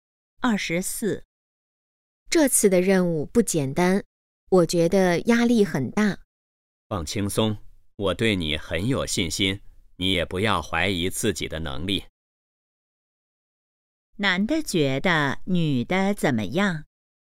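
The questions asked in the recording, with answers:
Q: 男的觉得女的怎么样?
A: 有能力,对她有信心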